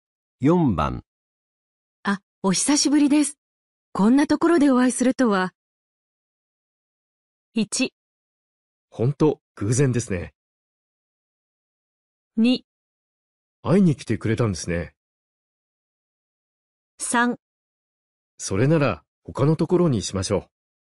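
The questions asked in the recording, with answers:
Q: あ、お久しぶりです。こんなところでお会いするとは。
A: 1: ほんと、偶然ですね。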